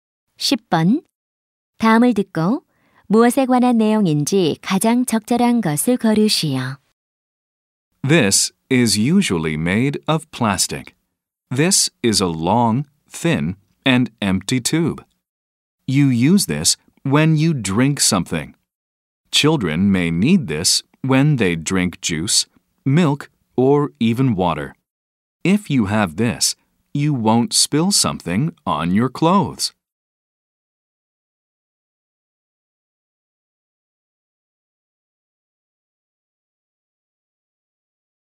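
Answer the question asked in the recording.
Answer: 빨대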